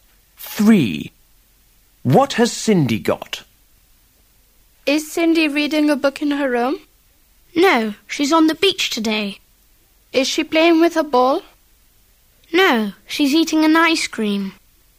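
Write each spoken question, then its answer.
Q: What has Cindy got?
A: An ice cream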